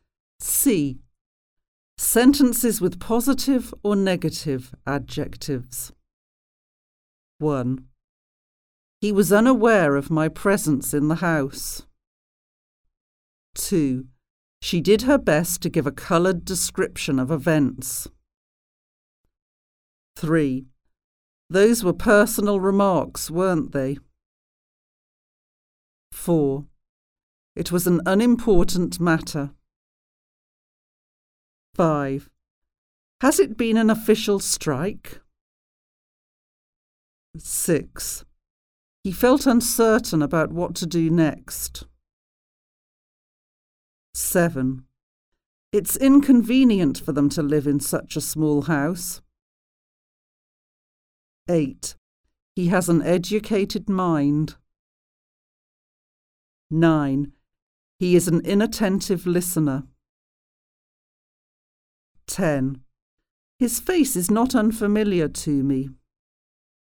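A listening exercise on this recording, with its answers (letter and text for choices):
Positive or Negative Adjectives?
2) He was (aware/unaware) of my presence in the house.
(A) aware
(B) unaware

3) She did her best to give (a coloured/an uncoloured) description of events.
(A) a coloured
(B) an uncoloured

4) Those were (personal/impersonal) remarks, weren't they?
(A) personal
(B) impersonal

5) It was an (important/unimportant) matter.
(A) important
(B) unimportant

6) Has it been an (official/unofficial) strike?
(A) official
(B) unofficial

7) He felt (certain/uncertain) about what to do next.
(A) certain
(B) uncertain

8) It's (convenient/inconvenient) for them to live in such a small house.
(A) convenient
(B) inconvenient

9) He has an (educated/uneducated) mind.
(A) educated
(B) uneducated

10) He is an (attentive/inattentive0 listener.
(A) attentive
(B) inattentive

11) His face is not (familiar/unfamiliar) to me.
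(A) familiar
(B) unfamiliar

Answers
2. (B) unaware
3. (A) a coloured
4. (A) personal
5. (B) unimportant
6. (A) official
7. (B) uncertain
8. (B) inconvenient
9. (A) educated
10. (B) inattentive
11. (B) unfamiliar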